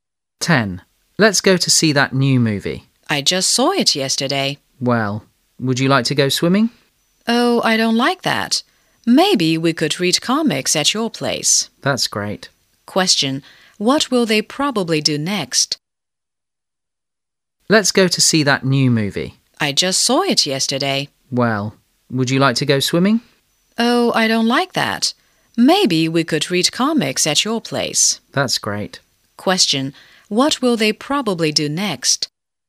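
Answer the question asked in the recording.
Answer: Read comics at the speaker's place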